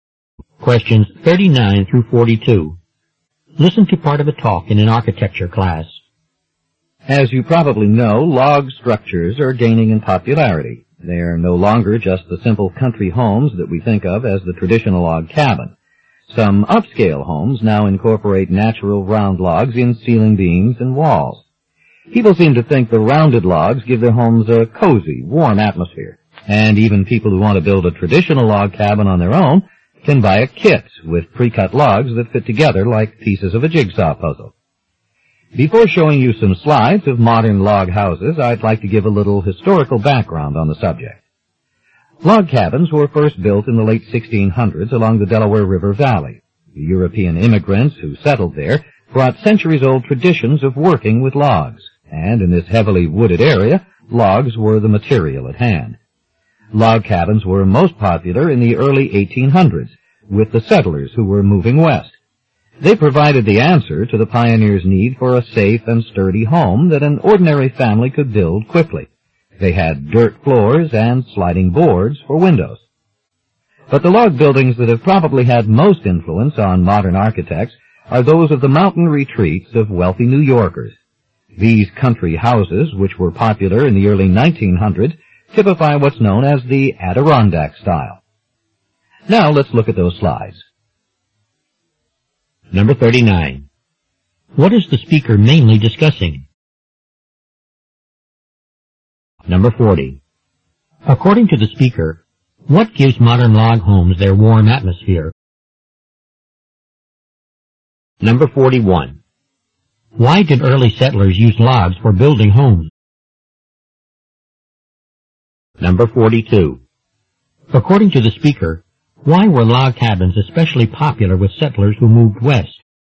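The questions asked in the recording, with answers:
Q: What is the speaker mainly discussing?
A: Log houses and their history

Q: According to the speaker, what gives modern log homes their warm atmosphere?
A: Natural round logs

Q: Why did early settlers use logs for building homes?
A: Logs were the material at hand, and the settlers had long traditions of working with logs.

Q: According to the speaker, why were log cabins especially popular with settlers who moved west?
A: An ordinary family could build a safe, sturdy home quickly.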